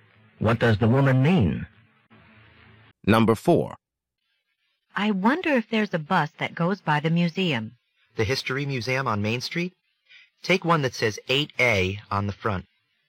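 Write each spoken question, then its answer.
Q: What does the man mean?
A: The 8A bus goes by the museum.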